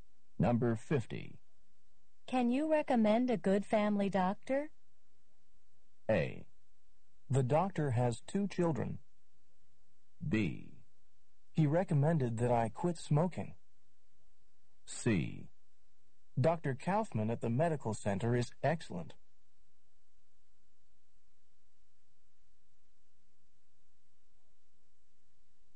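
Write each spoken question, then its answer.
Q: Can you recommend a good family doctor?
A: C: Dr. Kaufman at the medical center is excellent.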